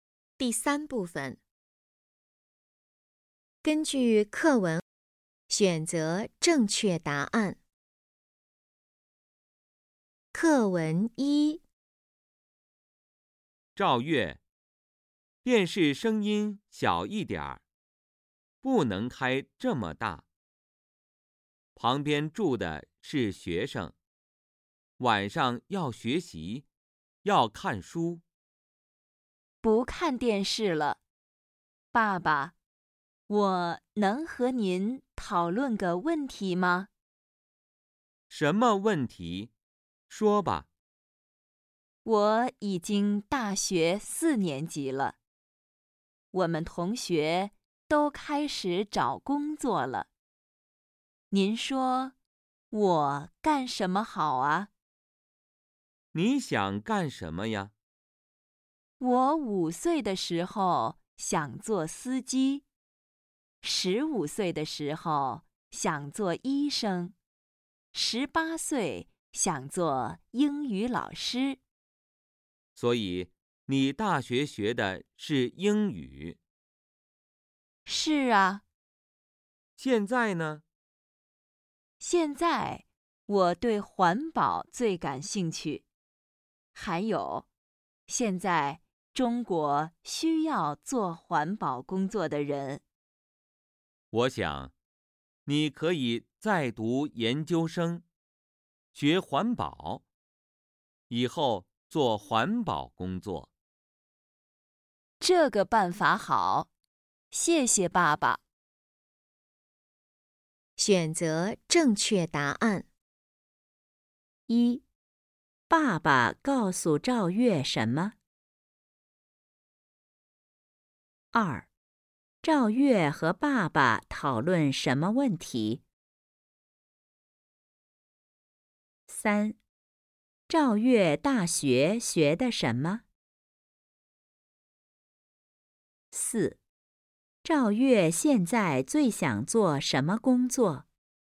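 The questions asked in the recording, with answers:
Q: 赵月和爸爸讨论什么问题?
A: 以后干什么工作

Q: 赵月大学学的什么?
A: 英语

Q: 赵月现在最想做什么工作?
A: 环保工作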